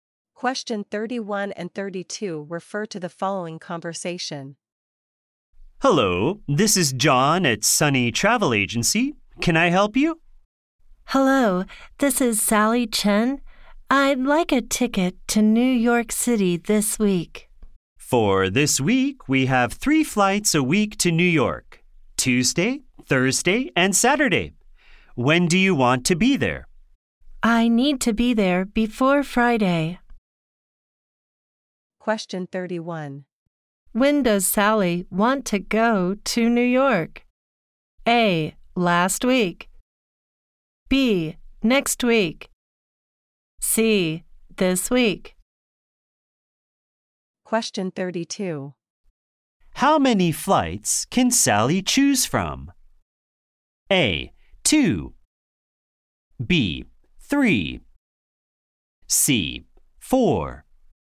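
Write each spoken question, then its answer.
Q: When does Sally want to go to New York?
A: C: This week.

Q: How many flights can Sally choose from?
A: B: 3.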